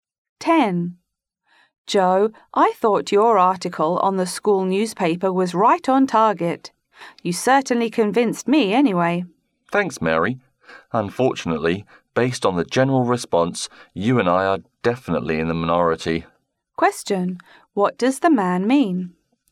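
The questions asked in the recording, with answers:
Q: What does the man mean?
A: Most people disagree with his article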